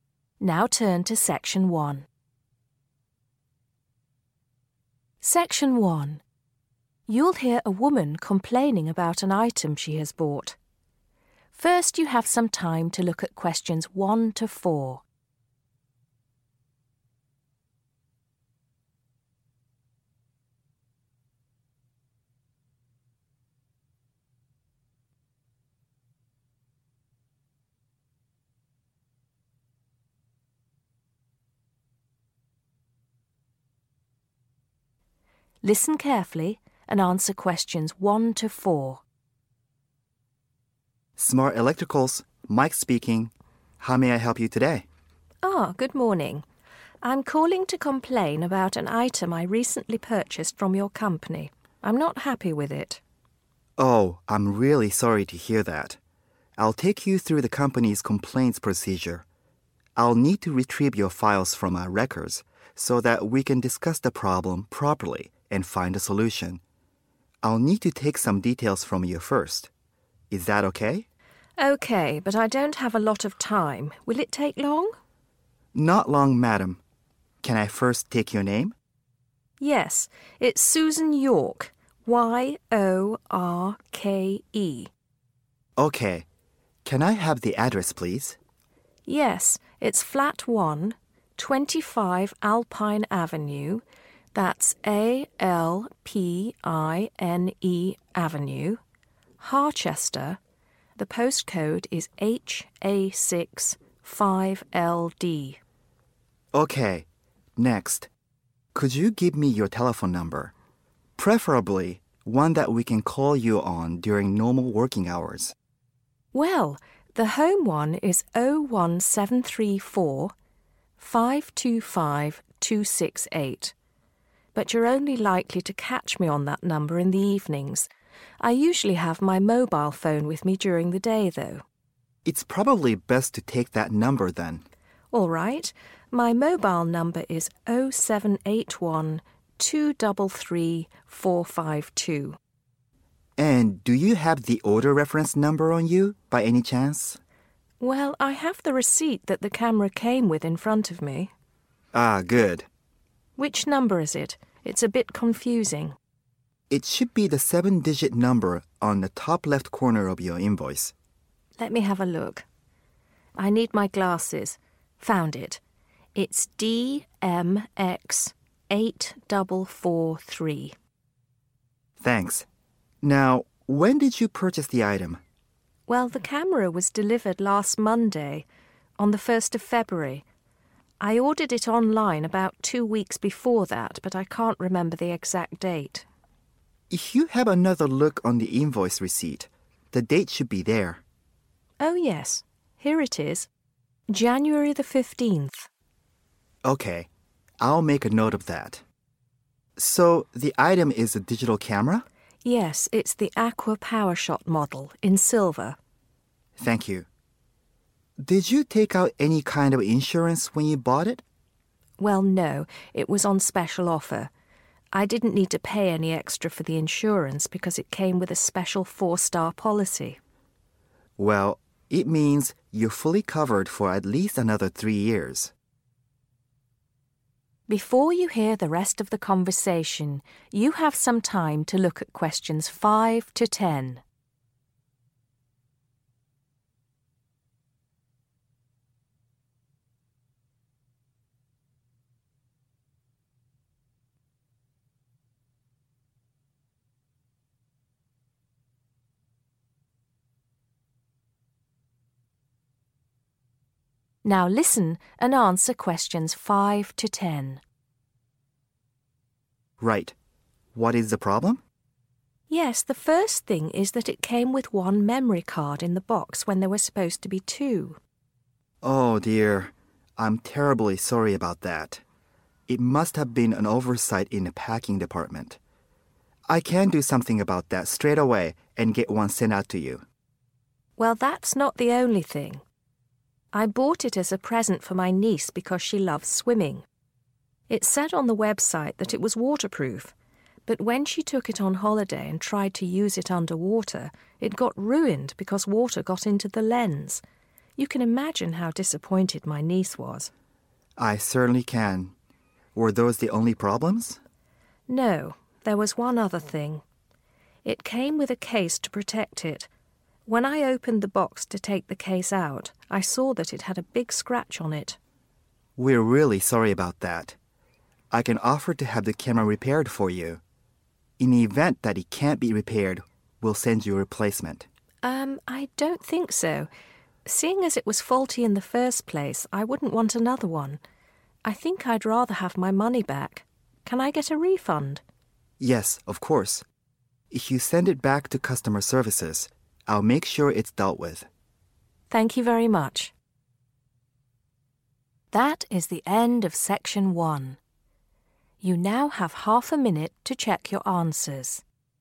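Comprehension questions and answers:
Complete the form below. Write NO MORE THAN TWO WORDS AND/OR A NUMBER for each answer.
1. Flat 1 1 ................. Harchester, HA6 5LD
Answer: 25 Alpine Avenue

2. 2............... 8443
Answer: DMX

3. Aqua Powershot digital camera in a 3................. colour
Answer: silver

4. Yes, has a 4................ policy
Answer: 4-star

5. 5................. missing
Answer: memory card

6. should be 6.................. , but isn't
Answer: waterproof

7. 7................. on case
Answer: scratch

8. If repair is possible, offered to provide a 8................. ,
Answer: replacement

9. but customer requests a 9..................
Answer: refund

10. Asked customer to send item to 10................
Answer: customer services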